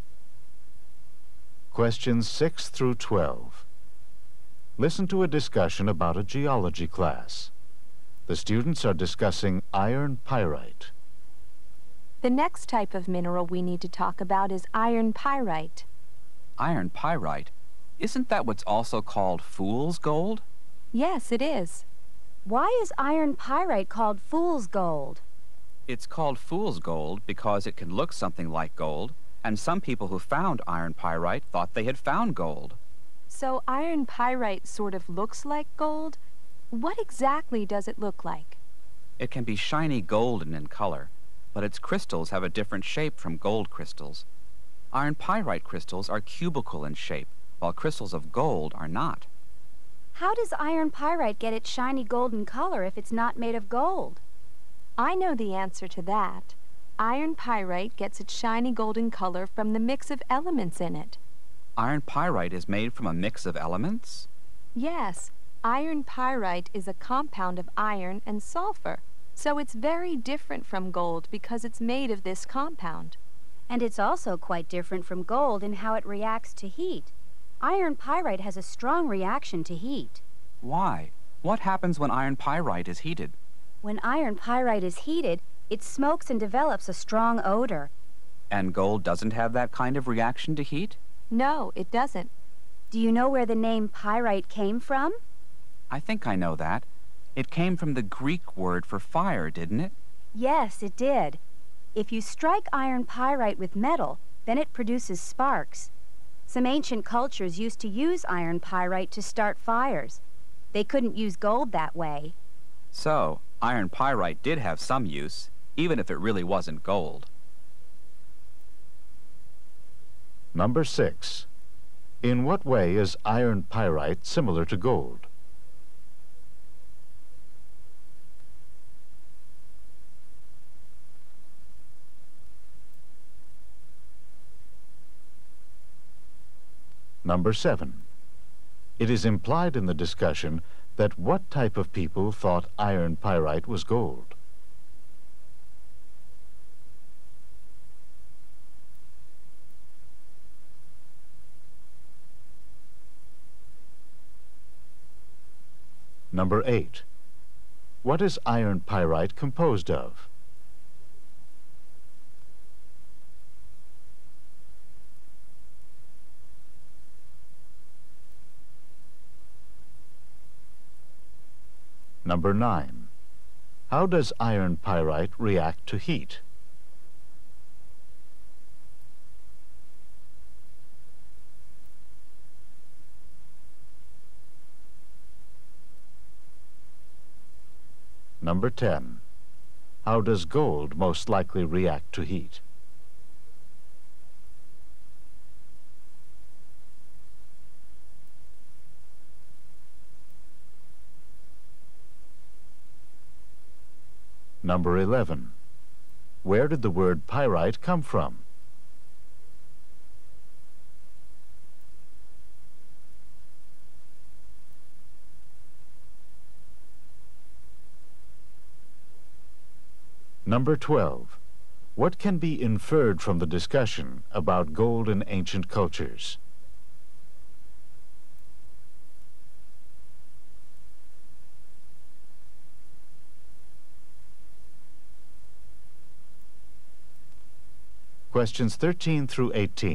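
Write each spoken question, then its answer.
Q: In what way is iron pyrite similar to gold?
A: It can be shiny and golden in color

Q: What is iron pyrite composed of?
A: Iron and sulfur

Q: How does iron pyrite react to heat?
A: It smokes and develops a strong odor

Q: How does gold most likely react to heat?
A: It does not smoke or smell

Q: Where did the word pyrite come from?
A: The Greek word for fire

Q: What can be inferred from the discussion about gold in ancient cultures?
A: It could not be used to start fires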